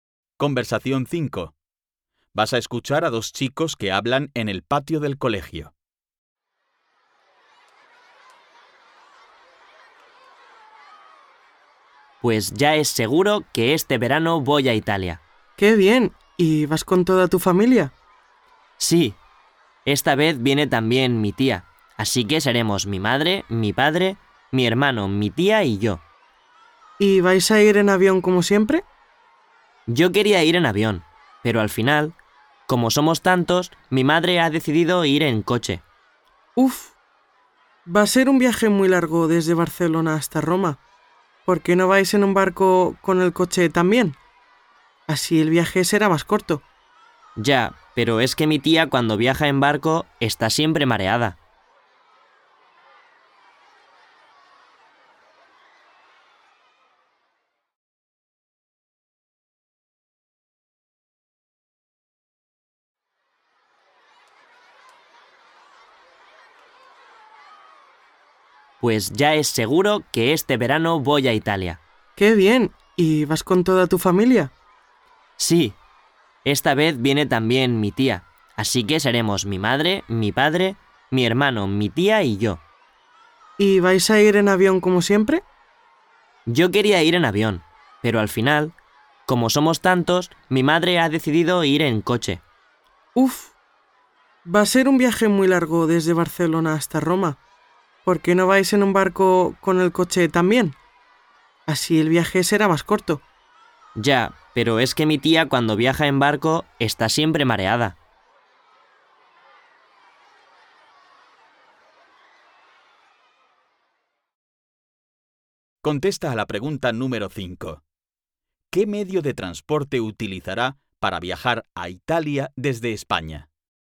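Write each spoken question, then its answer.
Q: ¿Qué medio de transporte utilizará para viajar a Italia desde España?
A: El coche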